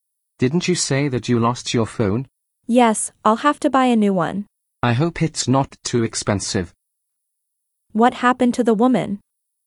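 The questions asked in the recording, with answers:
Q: What happened to the woman?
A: She lost her phone.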